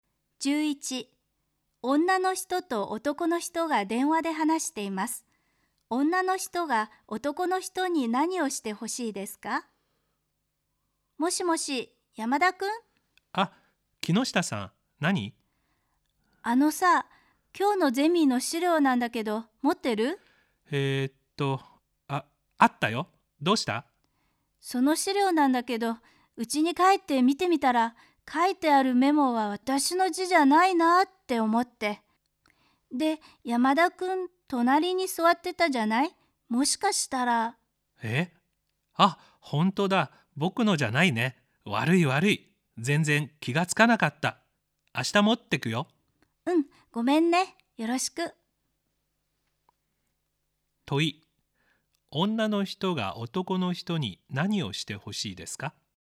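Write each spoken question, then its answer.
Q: 問い。女の人が男の人に何をしてほしいですか?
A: 取り違えたゼミの資料を明日持ってきてほしい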